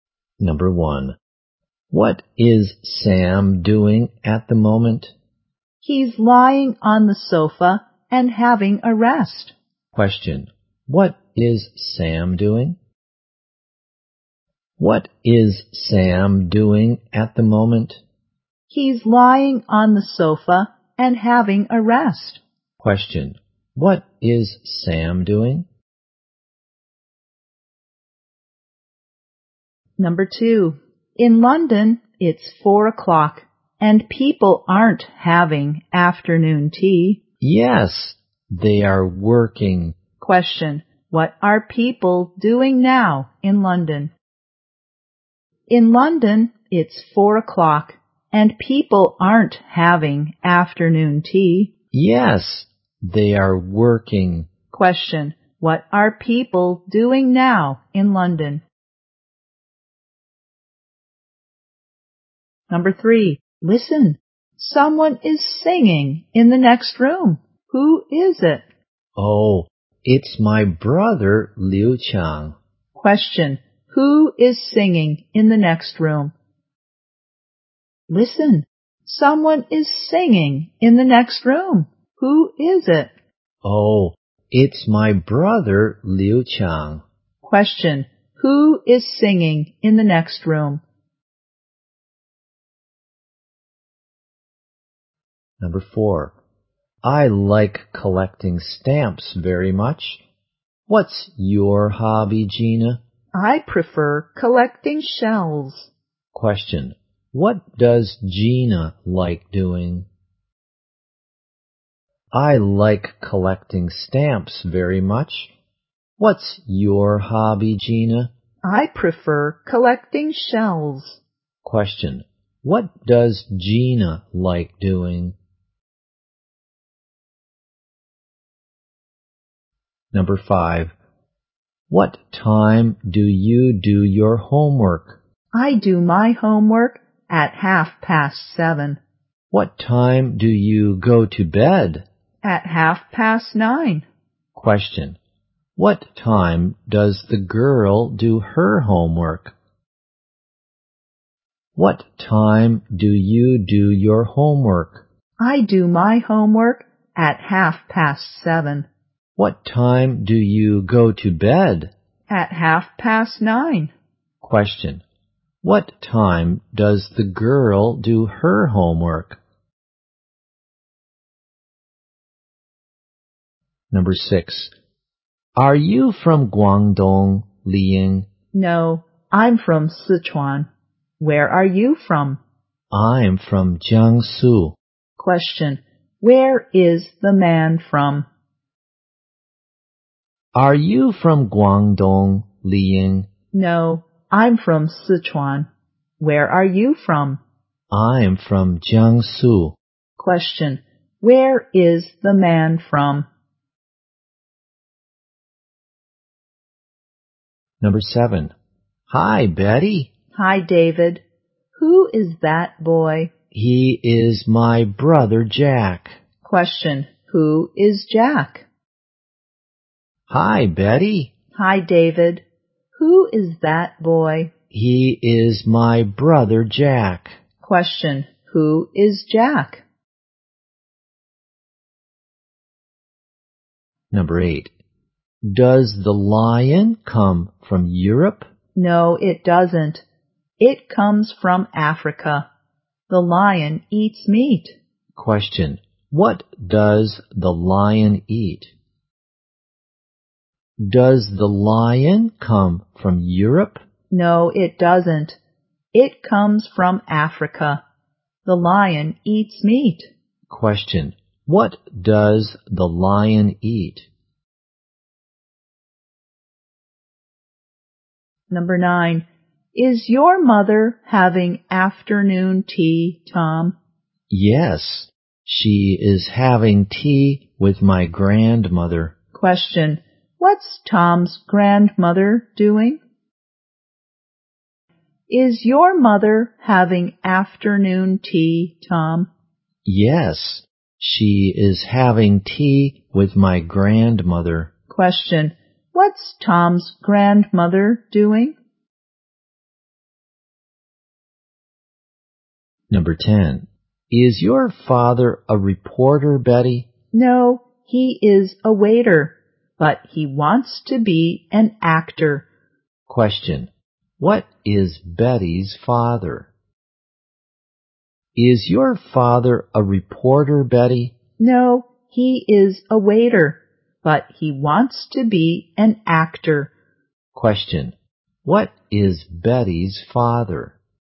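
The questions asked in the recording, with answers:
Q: Question, what is Sam doing?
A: He's lying on the sofa and having a rest.

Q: Question, what are people doing now in London?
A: They are working.

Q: Question, who is singing in the next room?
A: Liu Qiang, the speaker's brother

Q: Question, what does Gina like doing?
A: Collecting shells

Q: Question, what time does the girl do her homework?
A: At 7:30

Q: Question, where is the man from?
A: Jiangsu

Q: Question, what does the lion eat?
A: Meat

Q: Question. What's Tom's grandmother doing?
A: Having afternoon tea

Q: Question. What is Betty's father?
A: A waiter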